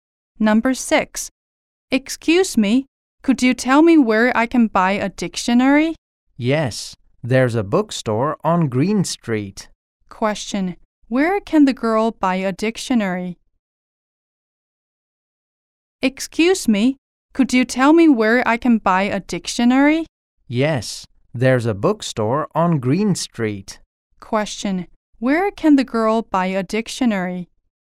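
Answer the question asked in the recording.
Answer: At a bookstore on Green Street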